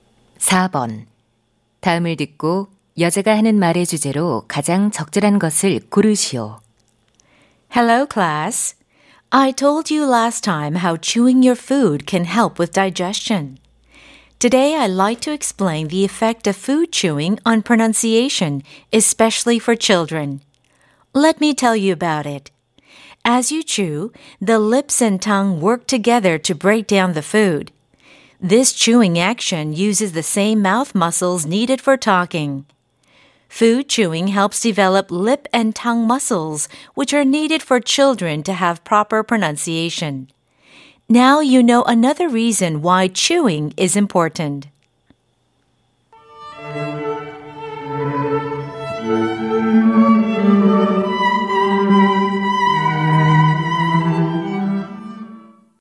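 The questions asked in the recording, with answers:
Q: 다음을 듣고 여자가 하는 말의 주제로 가장 적절한 것을 고르시오.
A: 음식 씹기가 아이들의 발음에 미치는 영향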